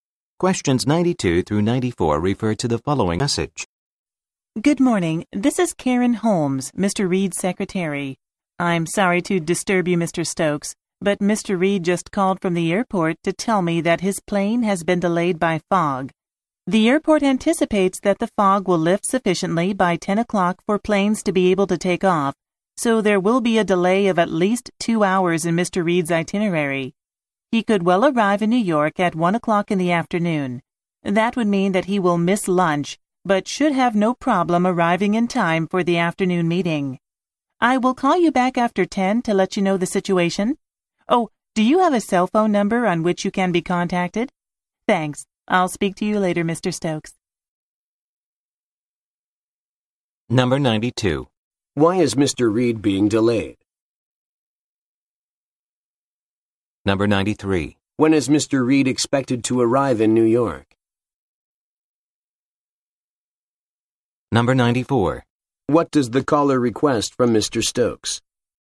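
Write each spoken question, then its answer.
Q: Why is Mr. Reed being delayed?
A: Fog

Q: When is Mr. Reed expected to arrive in New York?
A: At 1 p.m.

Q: What does the caller request from Mr. Stokes?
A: A cell phone number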